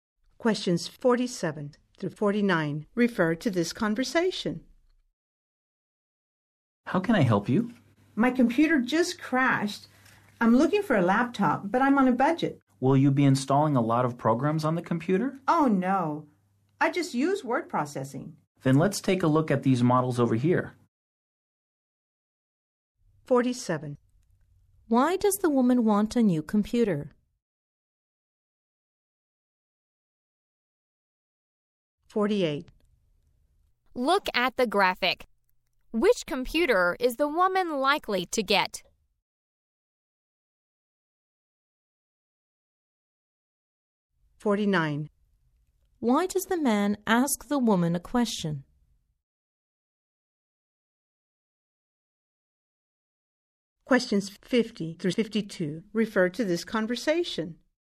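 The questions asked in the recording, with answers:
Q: Why does the woman want a new computer?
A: Her computer crashed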